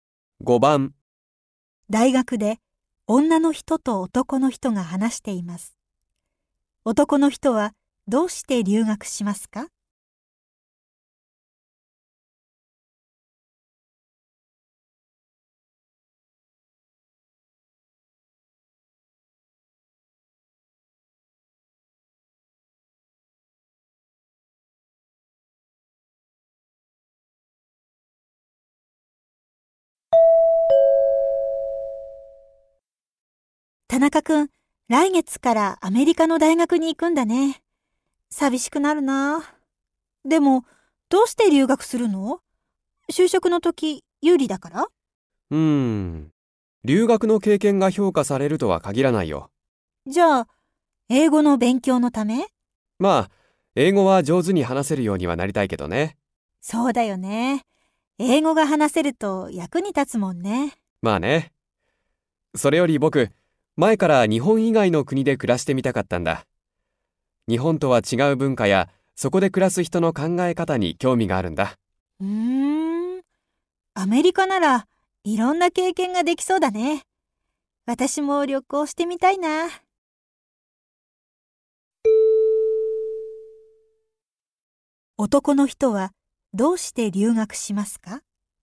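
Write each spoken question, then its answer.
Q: 男の人は、どうして留学しますか?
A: 日本以外の国で暮らしてみたかったから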